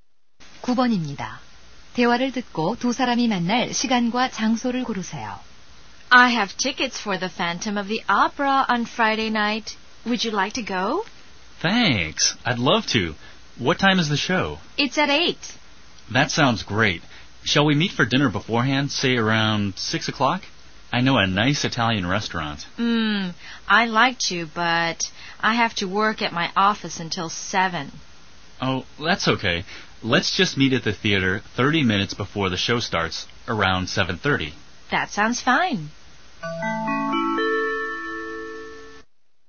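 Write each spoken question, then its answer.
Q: 대화를 듣고 두 사람이 만날 시간과 장소를 고르세요.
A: 7시 30분, 극장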